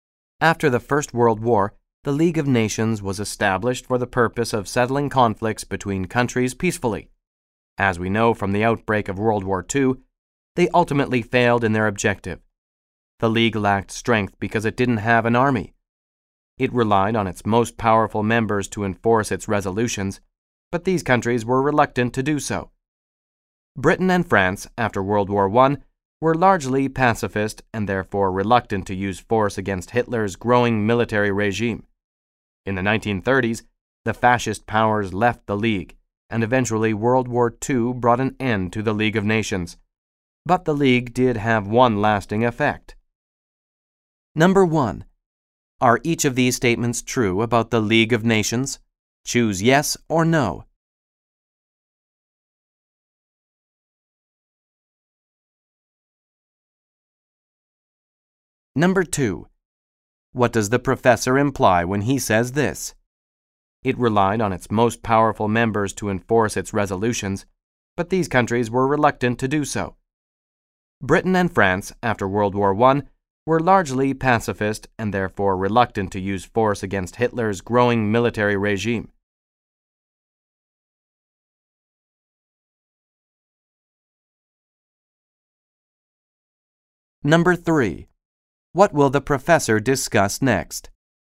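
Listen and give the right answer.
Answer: The one lasting effect of the League of Nations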